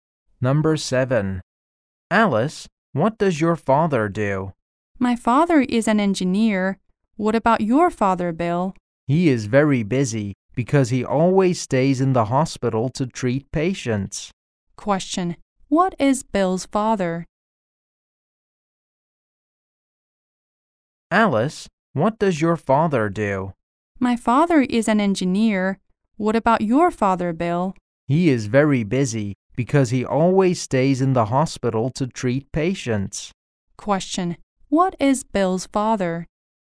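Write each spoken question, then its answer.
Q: what is Bill's father?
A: A doctor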